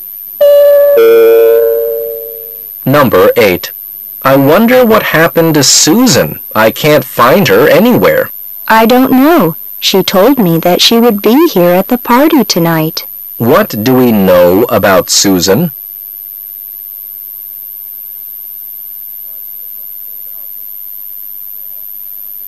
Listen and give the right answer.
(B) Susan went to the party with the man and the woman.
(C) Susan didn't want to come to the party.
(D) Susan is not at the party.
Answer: (D) Susan is not at the party.

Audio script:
[解析] M: I wonder what happened to Susan. I can't find her anywhere. W: I don't know. She told me that she would be here at the party tonight. Q: What do we know about Susan?